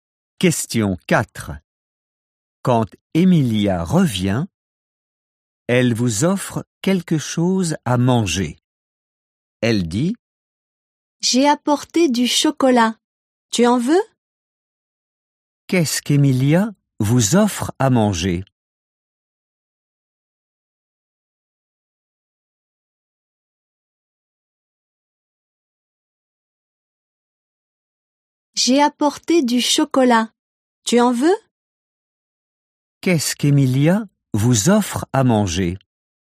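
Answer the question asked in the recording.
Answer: Du chocolat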